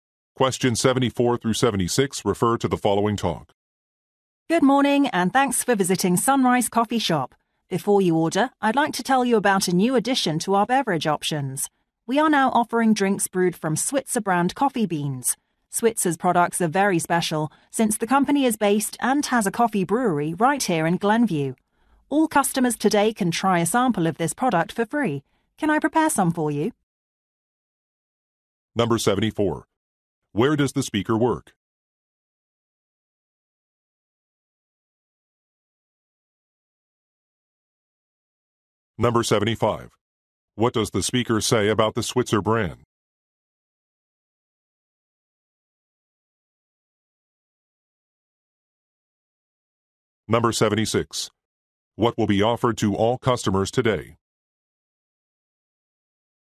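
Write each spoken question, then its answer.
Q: Where does the speaker work?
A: At a coffee shop

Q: What does the speaker say about the Switzer brand?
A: It is a local company based in Glenview

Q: What will be offered to all customers today?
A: A free sample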